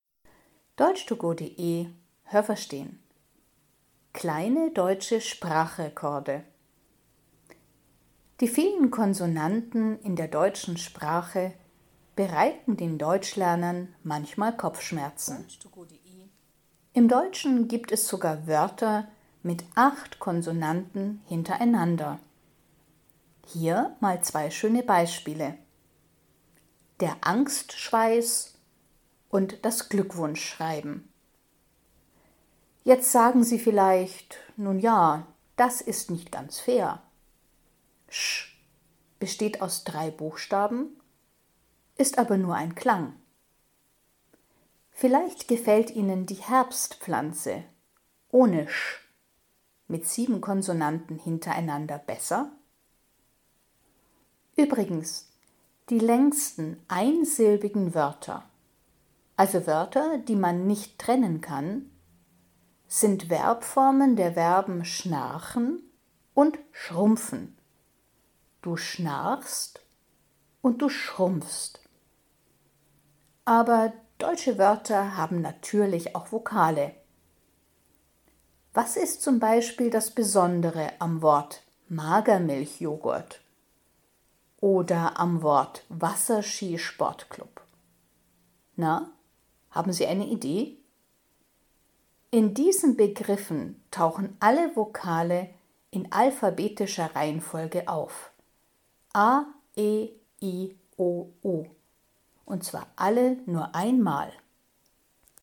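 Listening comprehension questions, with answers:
Haben Sie das gehört? Stimmt diese Aussage?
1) Das Wort Glückwunschschreiben hat mehr Konsonanten hintereinander als das Wort Angstschweiß.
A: falsch

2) „sch": Das sind drei Buchstaben mit nur einem Klang.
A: richtig

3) Im Wort Herbstpflanze stecken auch acht Konsonanten hintereinander.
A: falsch

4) Die beiden längsten Wörter mit nur einer Silbe sind schnarchen und schrumpfen.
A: falsch

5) Im Wort Magermilchjoghurt stecken alle Konsonanten in alphabetischer Reihenfolge.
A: falsch

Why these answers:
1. Beide Wörter haben acht Konsonanten hintereinander: Glückwunschschreiben und Angstschweiß.
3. Es sind 7 Konsonanten.
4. Schnar-chen und schrump-fen haben zwei Silben. Aber (du) schnarchst und (du) schrumpfst haben nur eine Silbe.
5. In dem Wort stecken alle Vokale in alphabetischer Reihenfolge.

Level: A (einfach)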